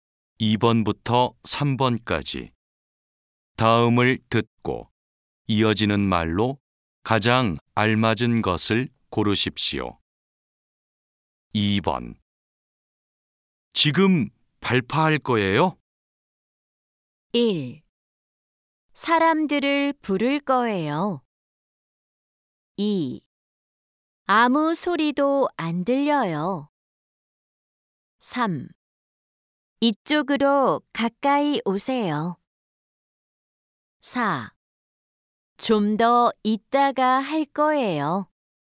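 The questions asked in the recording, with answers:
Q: 지금 발파할 거예요?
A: 4: 좀 더 이따가 할 거예요.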